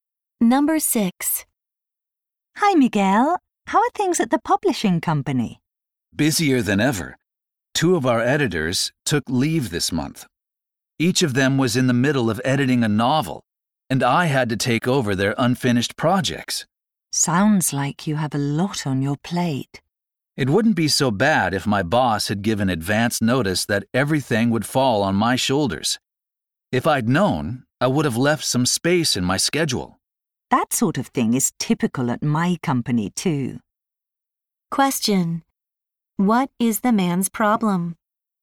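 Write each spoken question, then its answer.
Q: What is the man's problem?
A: His boss gave him extra editing work without warning, so he couldn't plan his schedule.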